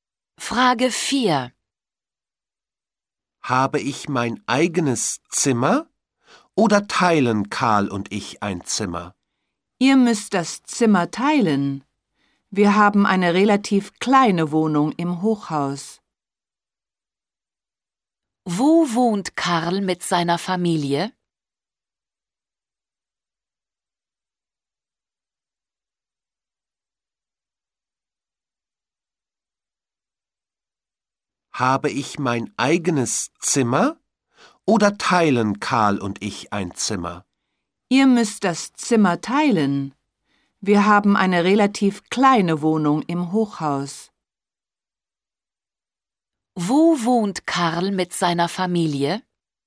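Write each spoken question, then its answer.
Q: Wo wohnt Karl mit seiner Familie?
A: In einer kleinen Wohnung im Hochhaus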